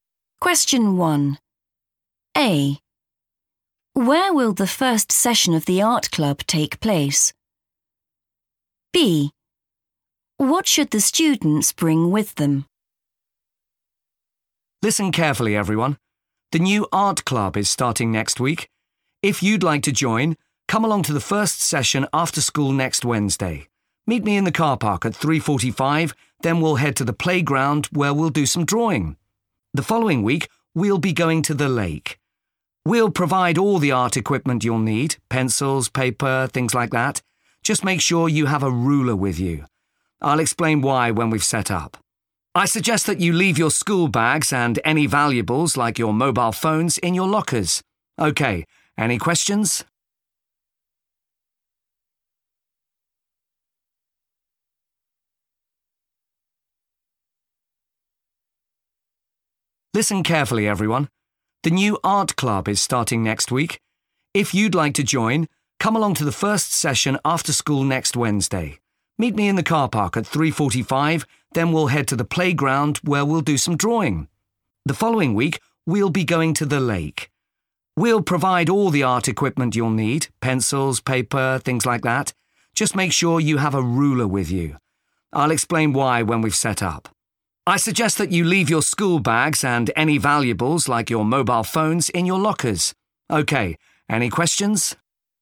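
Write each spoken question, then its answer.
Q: Where will the first session of the art club take place?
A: the playground

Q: What should the students bring with them?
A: a ruler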